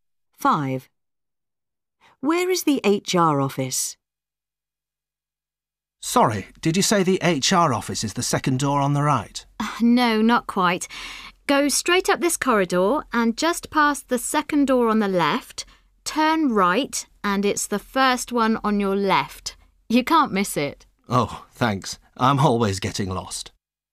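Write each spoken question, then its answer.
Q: Where is the HR office?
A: Go straight up the corridor, turn right just past the second door on the left; it's the first door on the left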